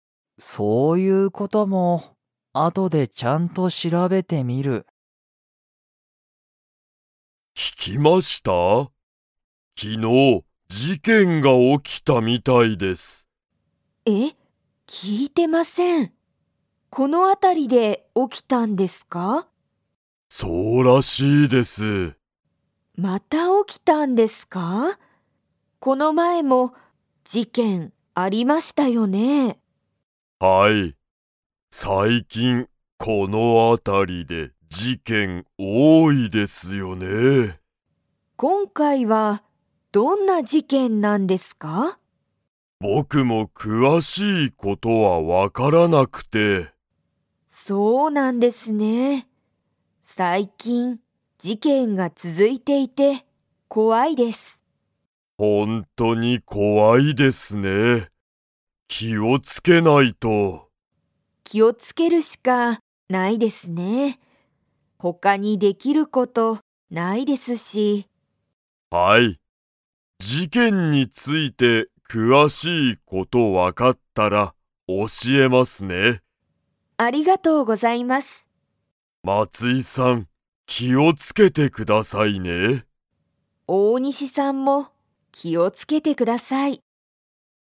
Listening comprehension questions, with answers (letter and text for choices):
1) 昨日きのう、どこで事件じけんが起おきましたか?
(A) 学校がっこう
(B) 松井まついさんの会社かいしゃ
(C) この辺あたり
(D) 隣となりの町まち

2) 大西おおにしさんは、事件じけんについて詳くわしい事ことを 。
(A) 知しっている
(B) 知しらない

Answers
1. (C) この辺あたり
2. (B) 知しらない

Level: Level 3